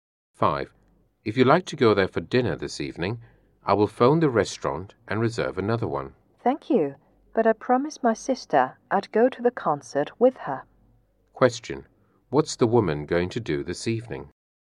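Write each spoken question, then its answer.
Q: What's the woman going to do this evening?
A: Go to a concert with her sister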